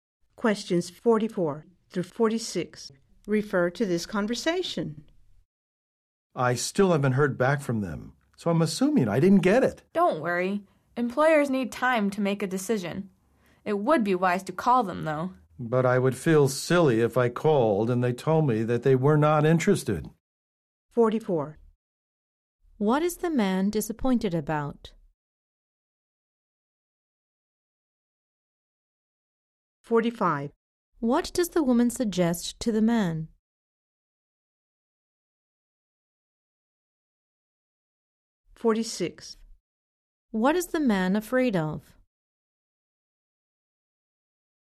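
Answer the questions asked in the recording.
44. He hasn't heard back about a job
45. Call the employer
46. Being told they are not interested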